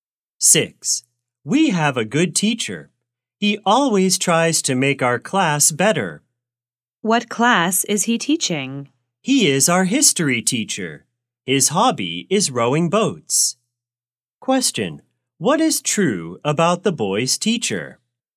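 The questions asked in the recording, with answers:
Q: What is true about the boy's teacher?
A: He teaches history and his hobby is rowing boats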